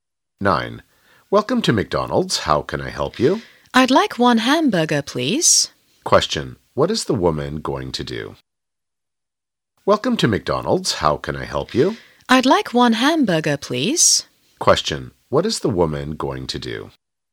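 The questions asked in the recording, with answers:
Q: What is the woman going to do?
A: Order/buy a hamburger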